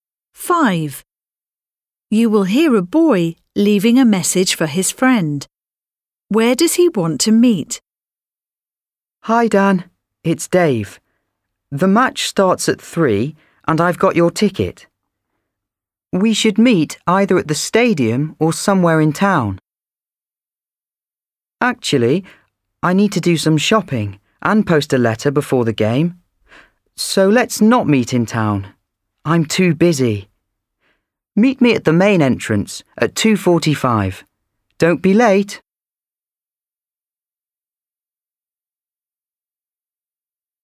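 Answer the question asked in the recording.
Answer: At the main entrance of the stadium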